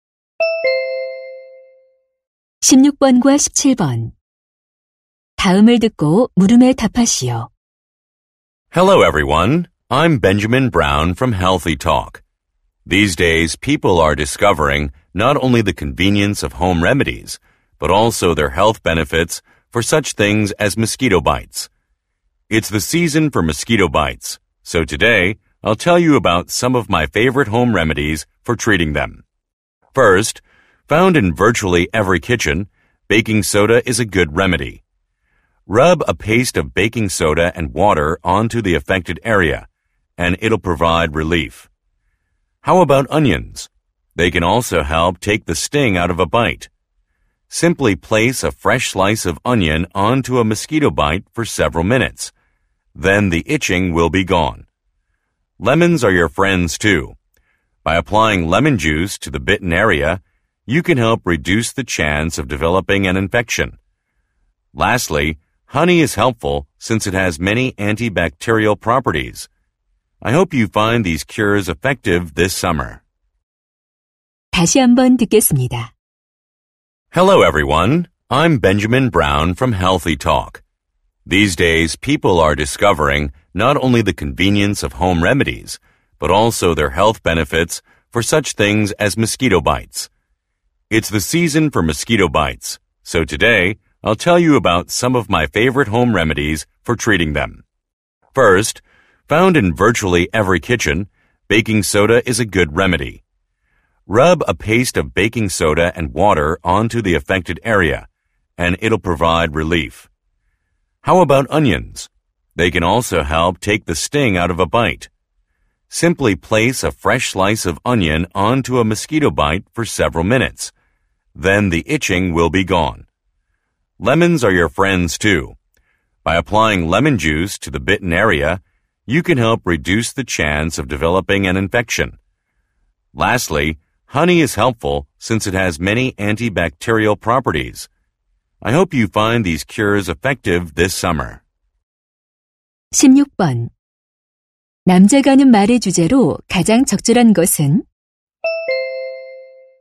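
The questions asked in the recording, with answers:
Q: 남자가 하는 말의 주제로 가장 적절한 것은?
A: 모기 물린 데에 쓰는 가정 요법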